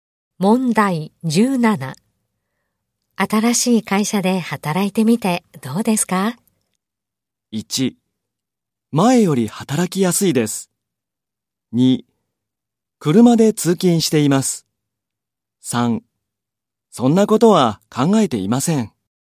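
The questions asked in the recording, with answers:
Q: 新しい会社で働いてみてどうですか?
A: 1: 前より働きやすいです。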